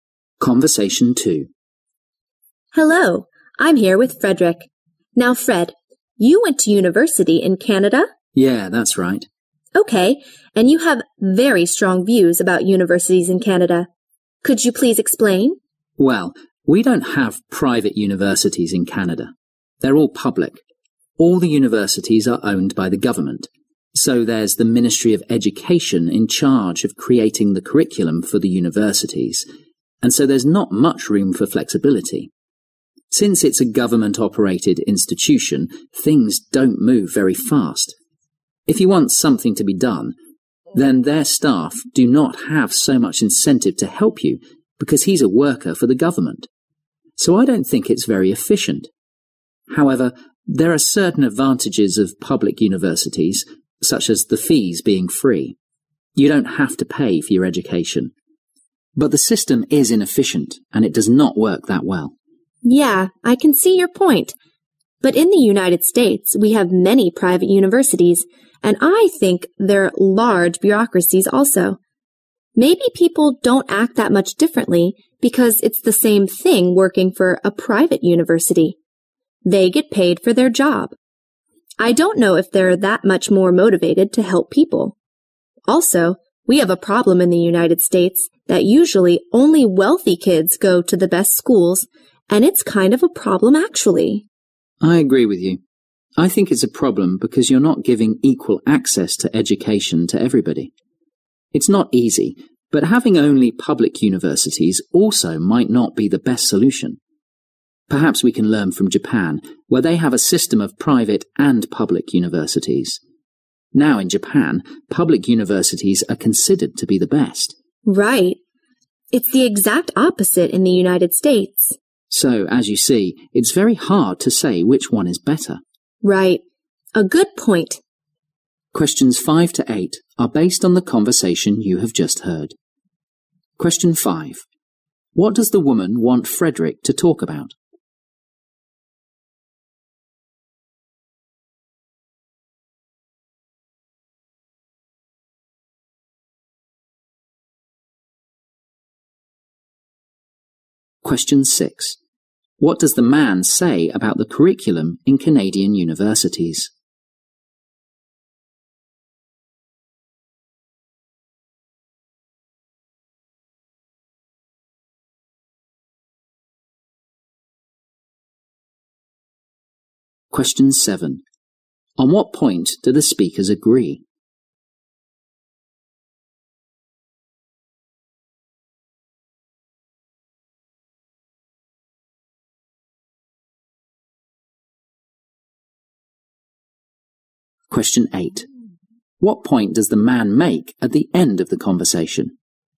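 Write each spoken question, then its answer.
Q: What does the woman want Frederick to talk about?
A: His views about universities in Canada

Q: What does the man say about the curriculum in Canadian universities?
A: It is created by the Ministry of Education, so there's little flexibility

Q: On what point do the speakers agree?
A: It's a problem that only wealthy kids go to the best schools (unequal access to education)

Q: What point does the man make at the end of the conversation?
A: It's very hard to say whether public or private universities are better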